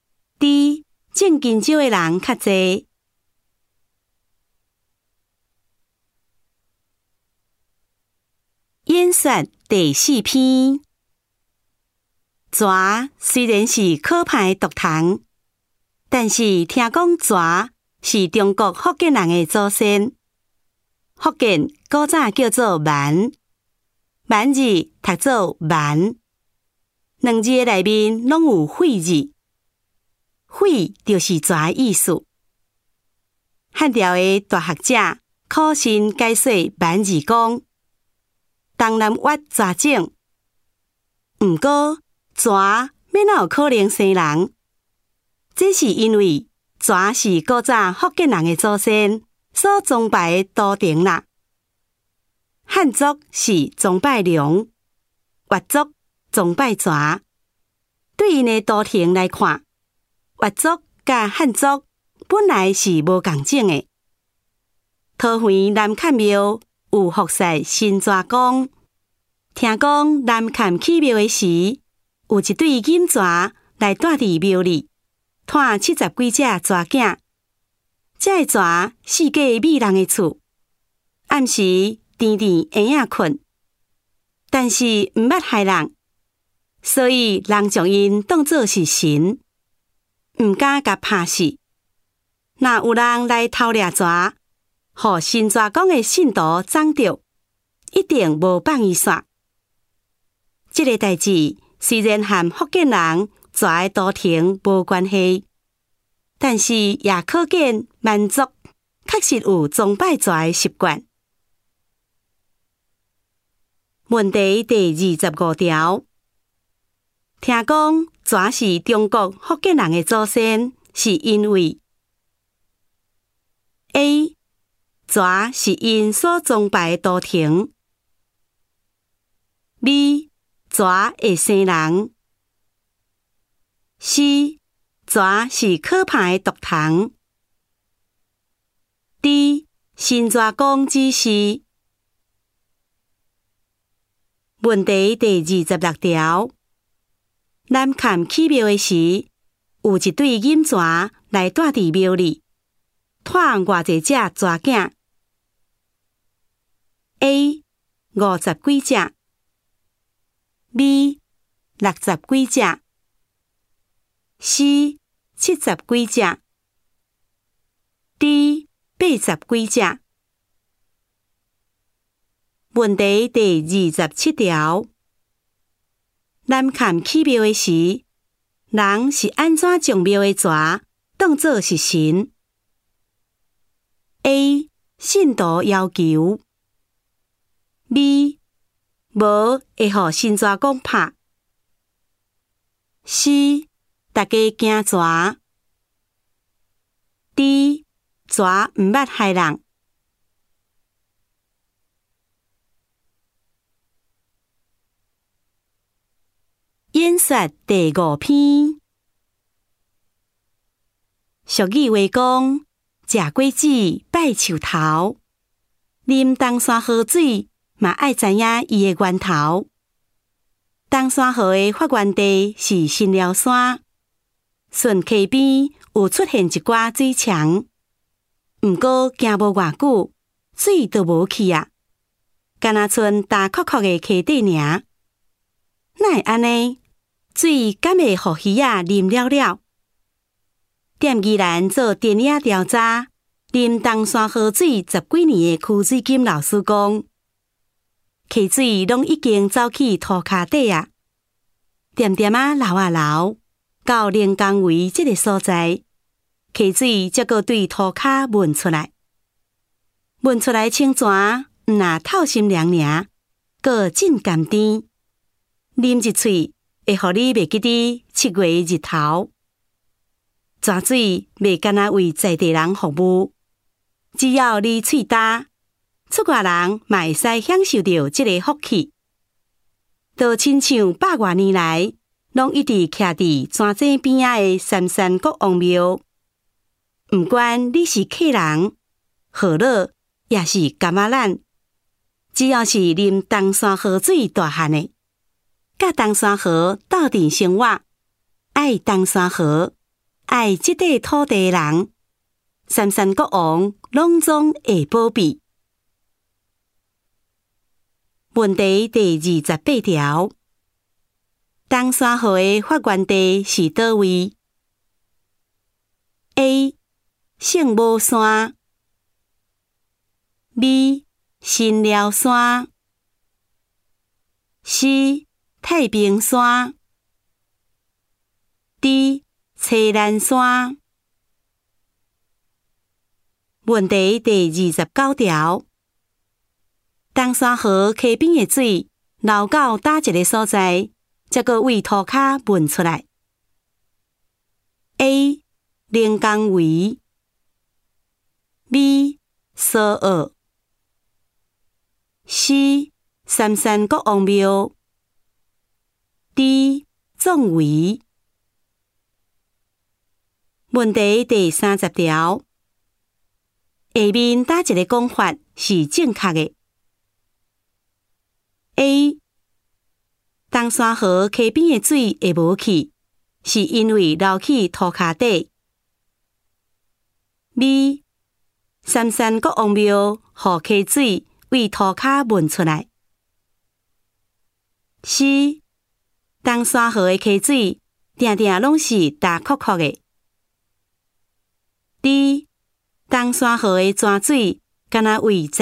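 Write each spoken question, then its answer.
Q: 听讲泉是中国福建人的祖先,是因为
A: A: 泉是因所崇拜的图腾

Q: 南崁起庙的时,有一对金泉来住伫庙里,带偌济只泉仔 ?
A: C: 70几只

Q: 南崁起庙的时,人是安怎将庙的泉当作是神 ?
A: D: 泉毋捌害人

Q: 东山河的发源地是叨位 ?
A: B: 新寮山

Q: 东山河溪边的水流到哪一个所在,才阁为土骹闻出来 ?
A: A: 连江围

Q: 下面哪一个讲法是正确的 ?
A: A: 东山河溪边的水会无去,是因为流去土脚底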